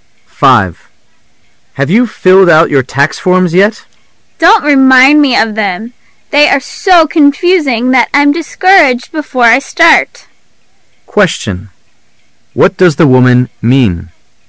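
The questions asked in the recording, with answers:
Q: What does the woman mean?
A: She hasn't done her tax forms because she finds them too confusing.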